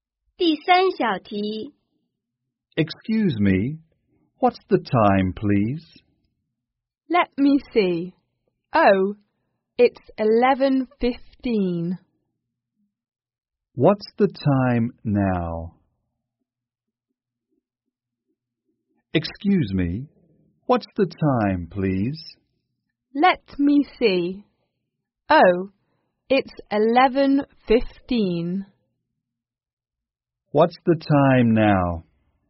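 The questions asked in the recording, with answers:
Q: What's the time now?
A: 11:15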